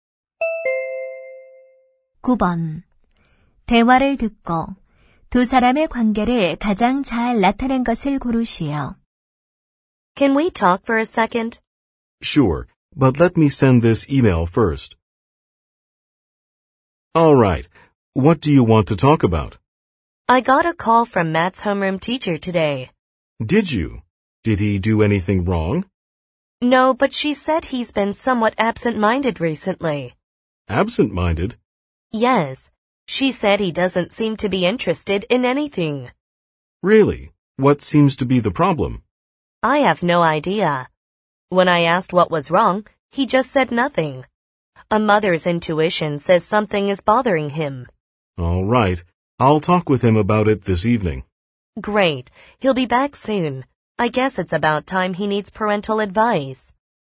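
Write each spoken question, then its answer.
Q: 대화를 듣고 두 사람의 관계를 가장 잘 나타낸 것을 고르시오.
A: 부부 (학부모)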